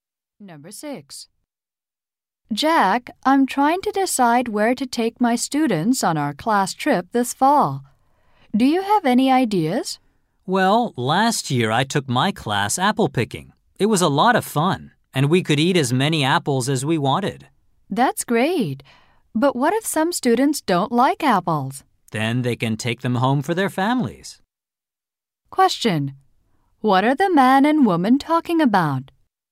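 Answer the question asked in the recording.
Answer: Where to take students on a class trip.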